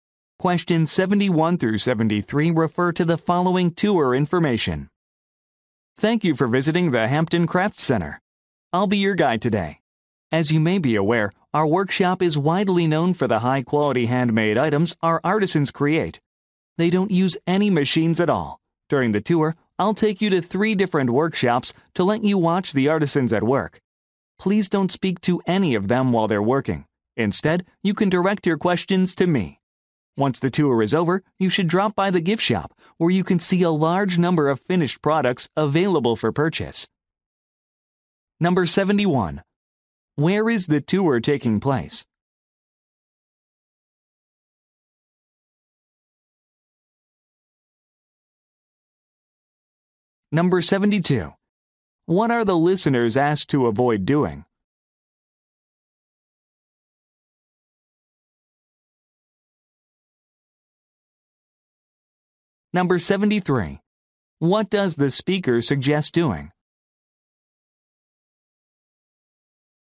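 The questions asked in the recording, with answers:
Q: Where is the tour taking place?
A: At the Hampton Craft Center, a craft workshop

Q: What are the listeners asked to avoid doing?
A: Speaking to the artisans while they work

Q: What does the speaker suggest doing?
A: Visiting the gift shop after the tour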